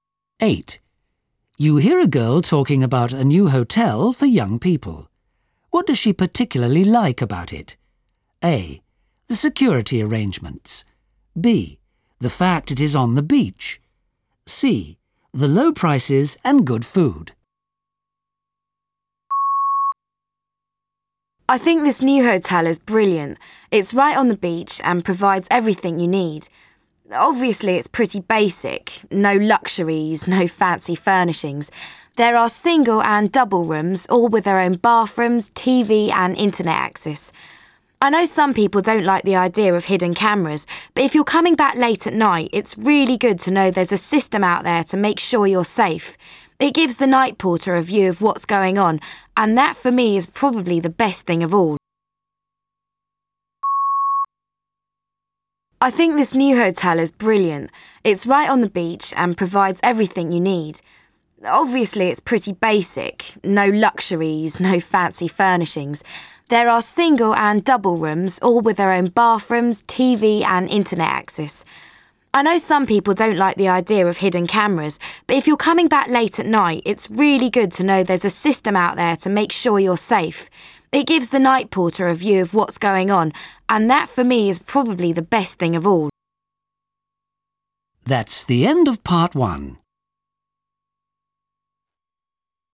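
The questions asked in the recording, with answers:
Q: What does she particularly like about it? A. The security arrangements. B. The fact it is on the beach. C. The low prices and good food.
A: A: The security arrangements.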